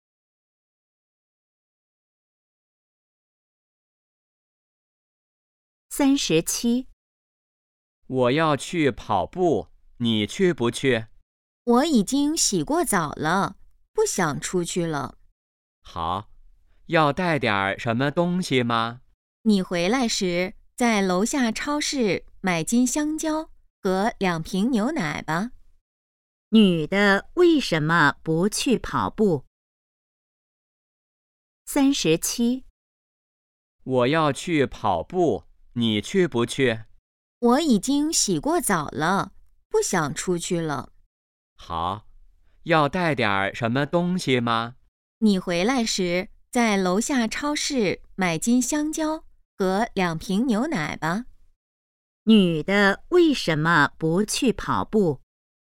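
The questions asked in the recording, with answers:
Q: 女的为什么不去跑步?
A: 已经洗过澡了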